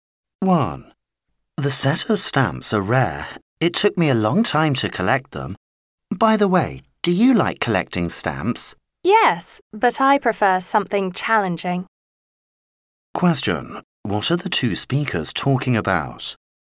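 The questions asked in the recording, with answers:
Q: What are the two speakers talking about?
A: Collecting stamps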